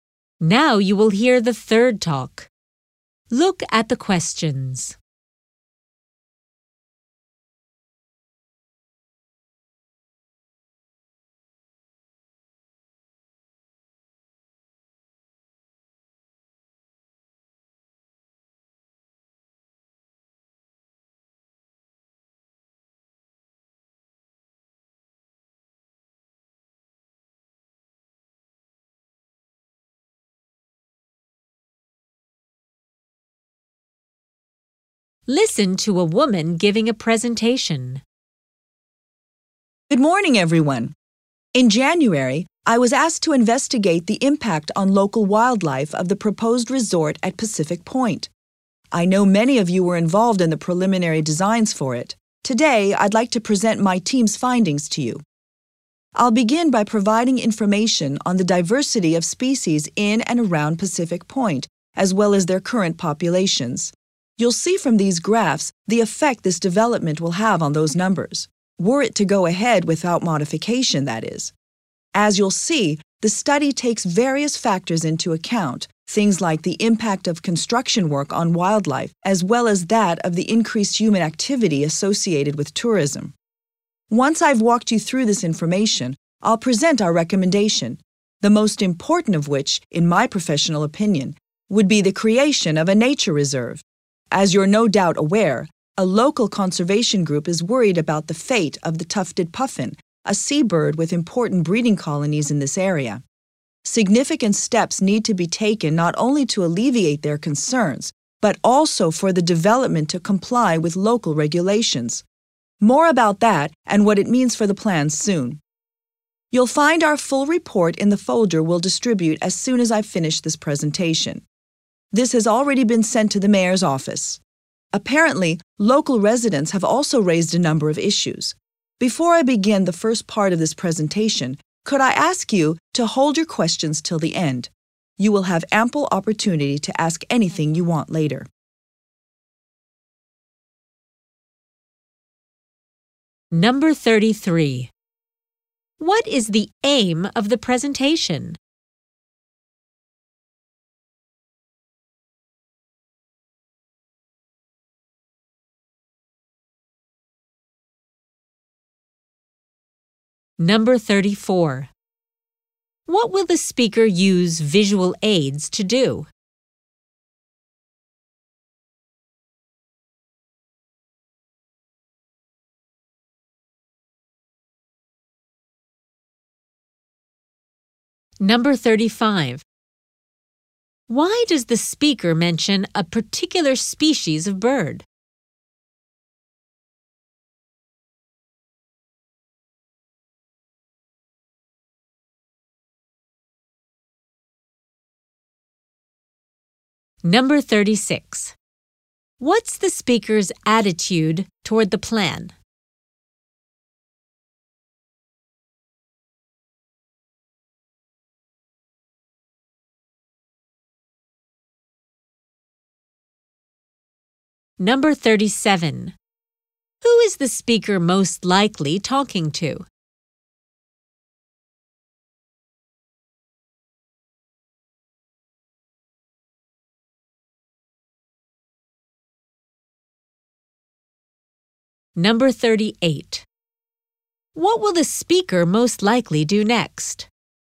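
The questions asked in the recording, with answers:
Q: What is the aim of the presentation?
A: To present findings on the resort's impact on local wildlife

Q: What will the speaker use visual aids to do?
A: Show how the development would affect species populations

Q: Why does the speaker mention a particular species of bird?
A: A conservation group is worried about its breeding colonies

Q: Who is the speaker most likely talking to?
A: People involved in designing the resort

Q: What will the speaker most likely do next?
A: Present information on species diversity and populations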